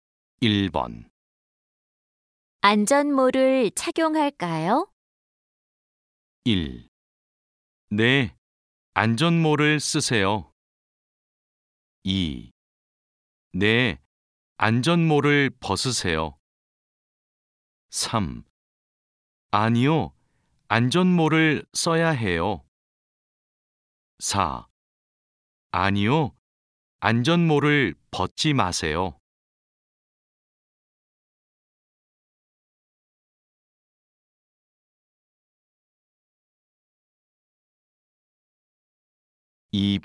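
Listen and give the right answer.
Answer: 1: 네, 안전모를 쓰세요.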